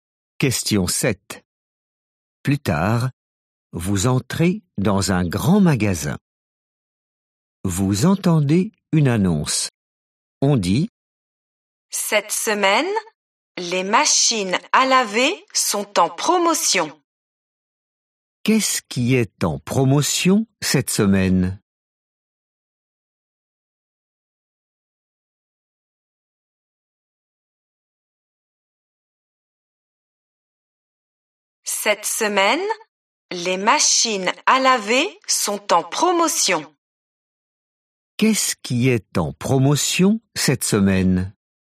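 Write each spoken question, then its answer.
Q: Qu'est-ce qui est en promotion cette semaine?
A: les machines à laver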